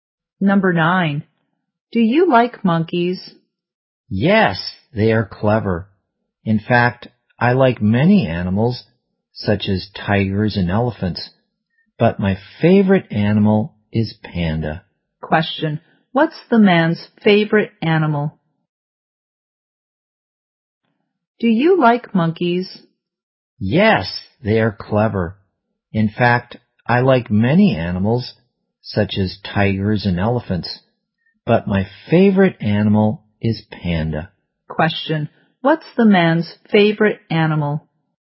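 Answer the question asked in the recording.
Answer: Panda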